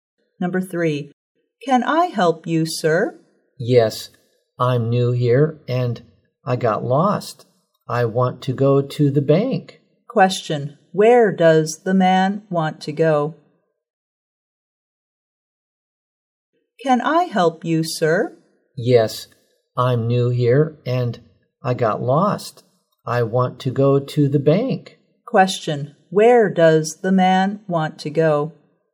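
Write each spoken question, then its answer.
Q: Question, where does the man want to go?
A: To the bank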